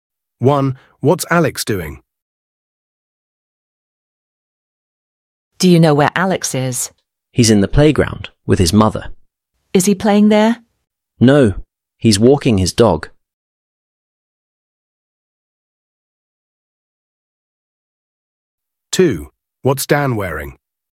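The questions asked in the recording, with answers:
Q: What's Alex doing?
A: Walking his dog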